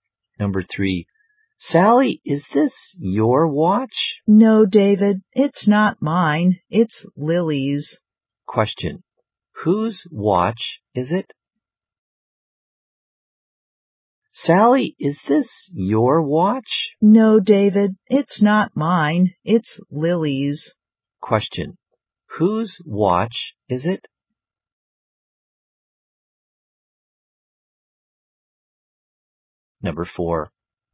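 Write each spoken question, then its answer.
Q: Whose watch is it?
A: Lily's.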